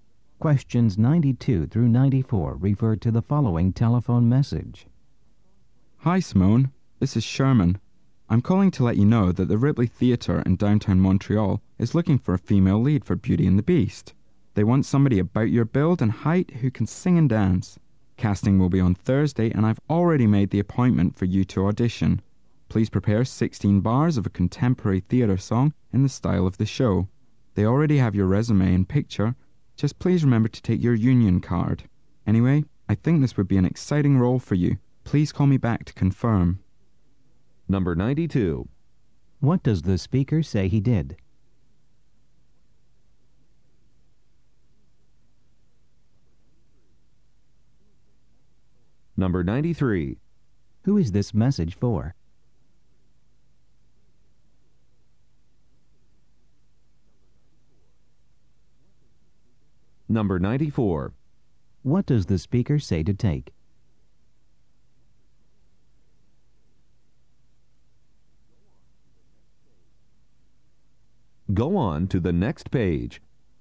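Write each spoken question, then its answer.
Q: What does the speaker say he did?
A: He made an audition appointment for her

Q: Who is this message for?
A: Simone, an actress

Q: What does the speaker say to take?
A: Her union card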